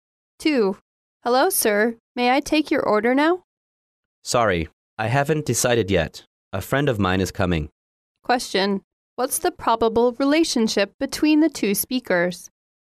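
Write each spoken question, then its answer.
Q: What's the probable relationship between the two speakers?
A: Waiter and customer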